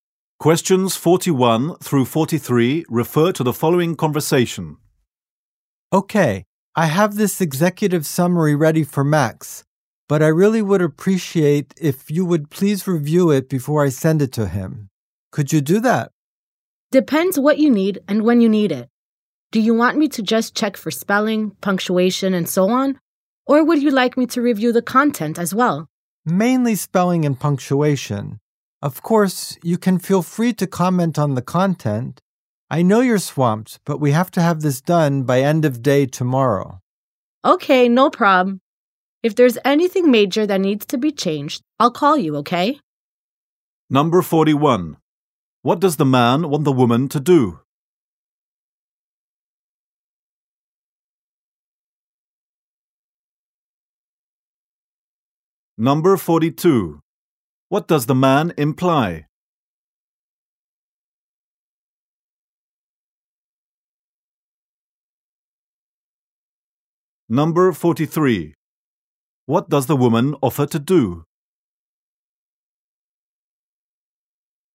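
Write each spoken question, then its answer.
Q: What does the man want the woman to do?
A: Review his executive summary before he sends it to Max

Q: What does the woman offer to do?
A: Call him if anything major needs changing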